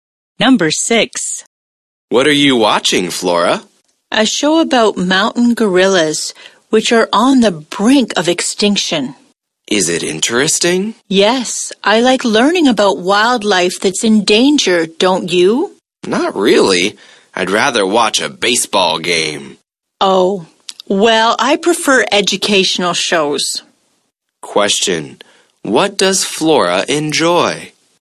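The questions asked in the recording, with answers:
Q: what does Flora enjoy?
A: Educational shows about endangered wildlife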